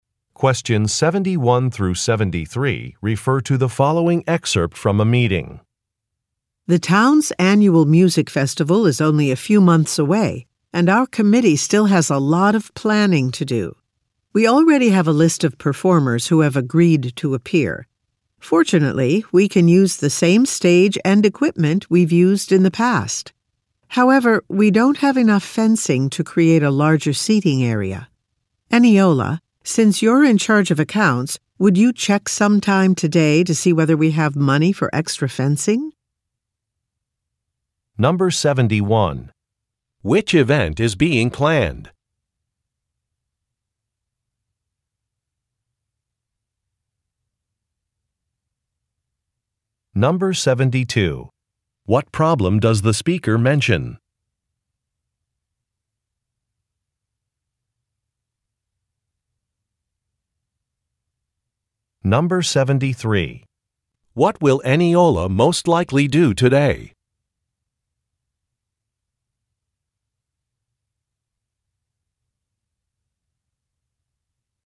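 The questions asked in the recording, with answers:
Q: Which event is being planned?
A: The town's annual music festival

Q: What problem does the speaker mention?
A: There isn't enough fencing for a larger seating area

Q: What will Eniola most likely do today?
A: Check whether there is money for extra fencing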